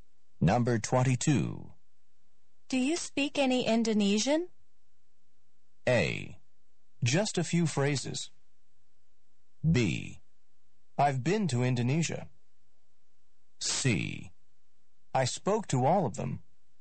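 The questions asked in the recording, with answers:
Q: Do you speak any Indonesian?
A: A: Just a few phrases.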